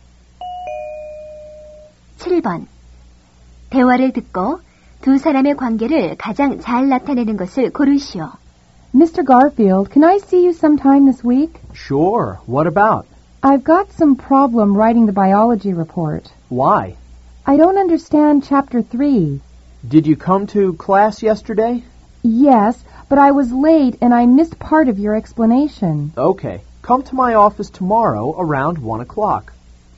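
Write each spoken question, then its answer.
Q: 두 사람의 관계를 가장 잘 나타내는 것을 고르시오.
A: 교사와 학생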